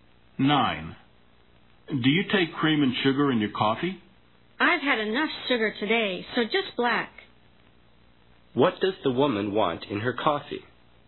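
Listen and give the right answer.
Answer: Nothing; just black.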